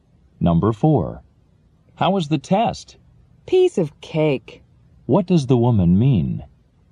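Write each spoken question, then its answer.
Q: What does the woman mean?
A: The test was very easy.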